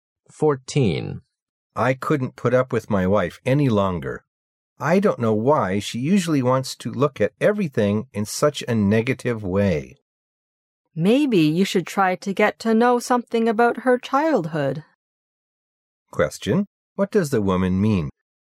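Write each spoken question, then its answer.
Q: What does the woman mean?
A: He should try to learn about his wife's childhood.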